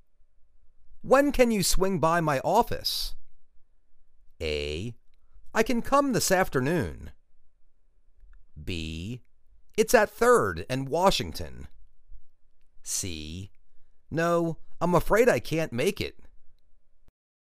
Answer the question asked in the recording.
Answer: I can come this afternoon.